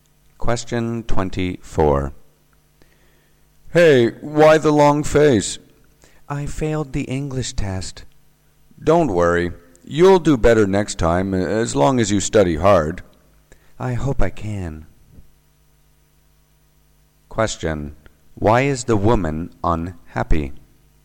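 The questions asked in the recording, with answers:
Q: Why is the woman unhappy?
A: She failed the English test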